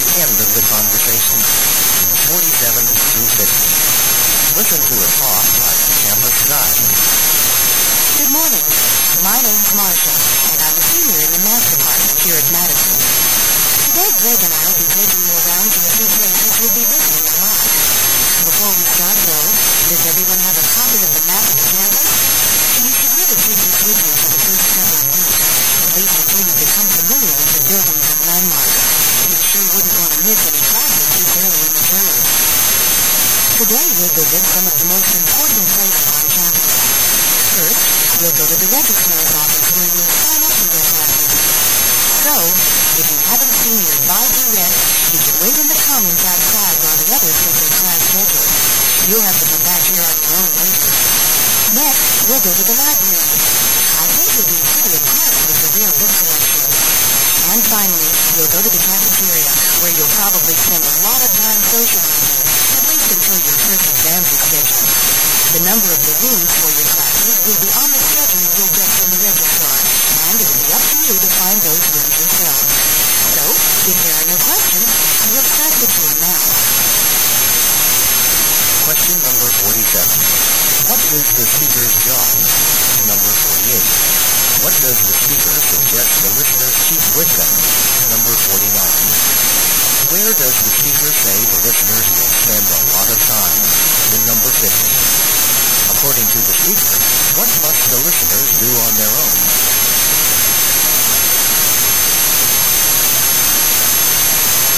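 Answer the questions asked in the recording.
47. Campus tour guide (a student)
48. A campus map
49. In the cafeteria
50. Find their classrooms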